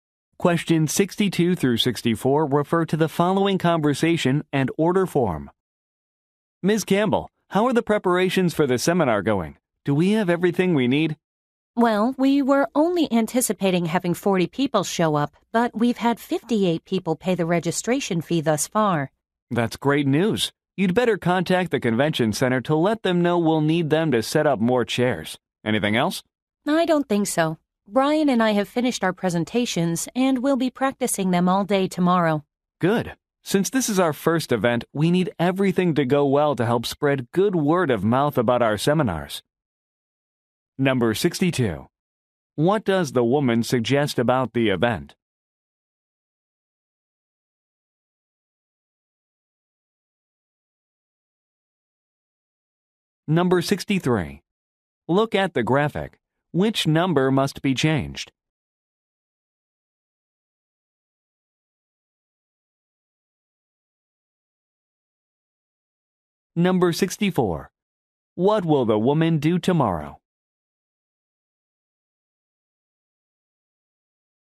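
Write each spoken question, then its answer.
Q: What does the woman suggest about the event?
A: More people registered than expected

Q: What will the woman do tomorrow?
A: Practice her presentation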